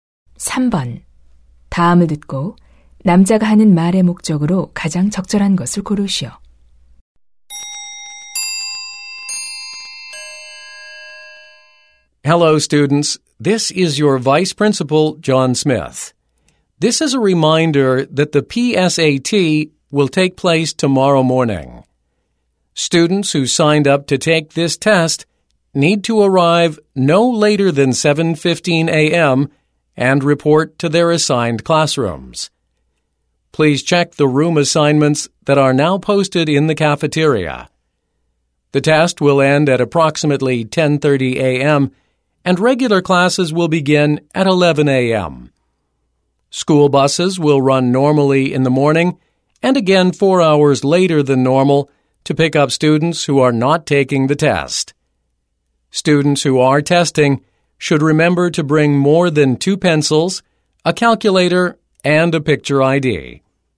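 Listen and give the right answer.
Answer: 내일 아침 PSAT 시험 일정과 준비물을 안내하려고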